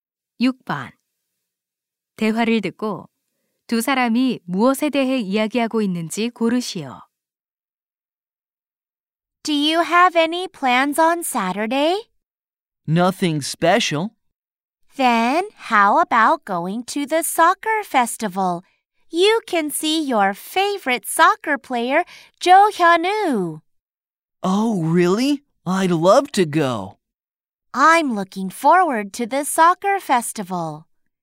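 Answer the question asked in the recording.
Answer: 축구 축제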